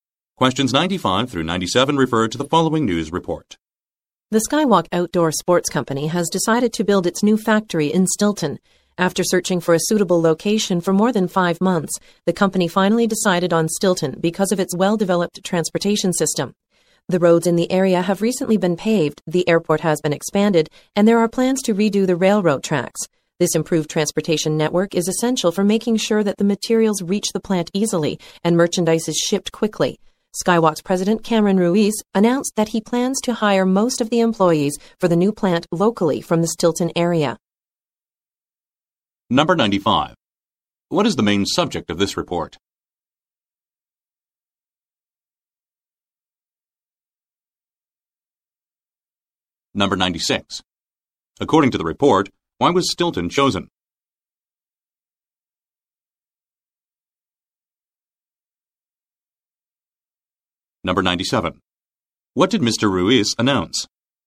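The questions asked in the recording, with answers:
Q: What is the main subject of this report?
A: Skywalk's new factory in Stilton

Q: According to the report, why was Stilton chosen?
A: Its well-developed transportation system

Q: What did Mr. Ruiz announce?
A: He will hire most of the workers locally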